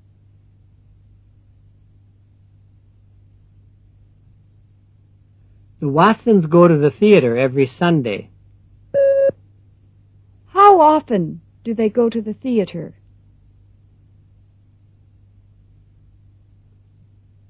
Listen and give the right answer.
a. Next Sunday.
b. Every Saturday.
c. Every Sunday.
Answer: c. Every Sunday.

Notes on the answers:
The Watsons go to the theatre every Sunday. Howoften do they go to the theatre?